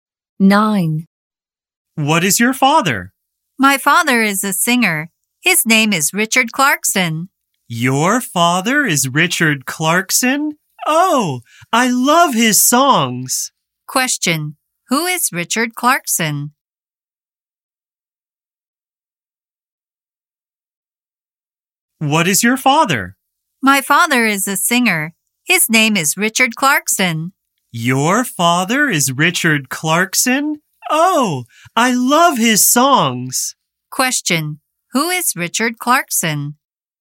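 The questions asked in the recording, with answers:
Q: Question, who is Richard Clarkson?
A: He is a singer, the speaker's father.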